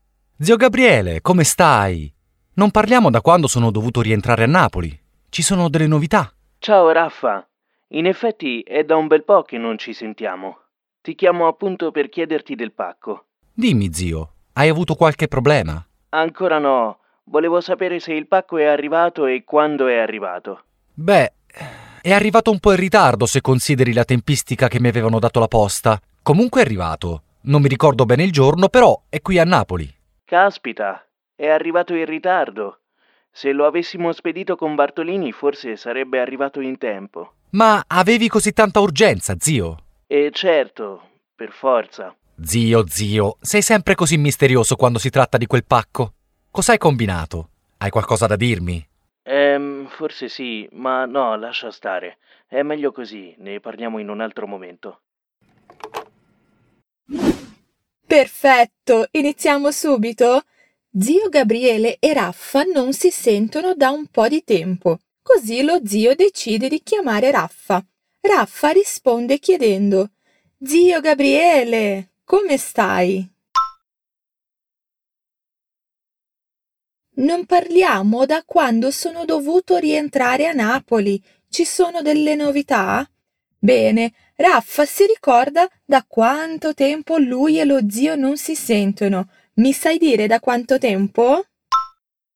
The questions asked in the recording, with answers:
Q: Mi sai dire da quanto tempo?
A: Da quando sono dovuto rientrare a Napoli.